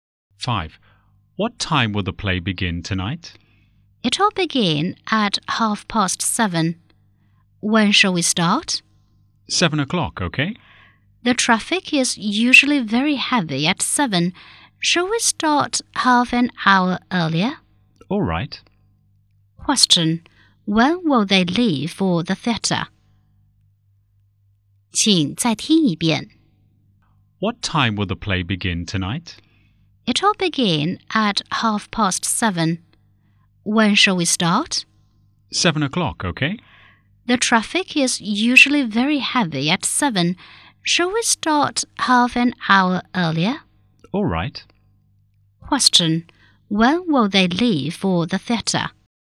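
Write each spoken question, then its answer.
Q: When will they leave for the theatre?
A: At 6:30.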